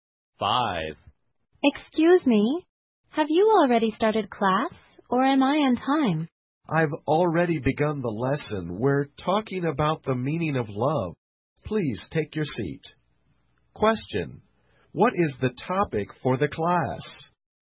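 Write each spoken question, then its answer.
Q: What is the topic for the class?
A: The meaning of love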